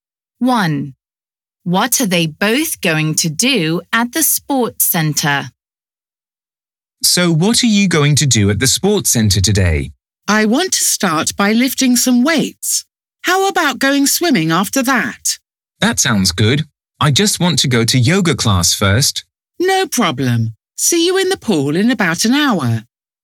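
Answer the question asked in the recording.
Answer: go swimming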